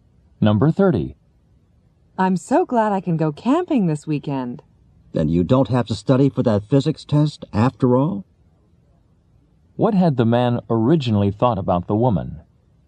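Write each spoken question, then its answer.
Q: What had the man originally thought about the woman?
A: That she had to study for a physics test.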